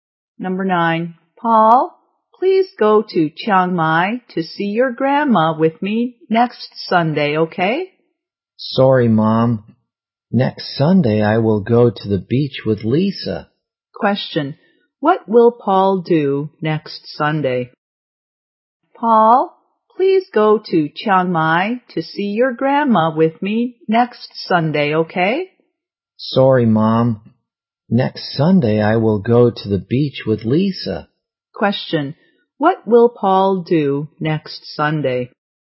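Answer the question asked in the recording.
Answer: Go to the beach with Lisa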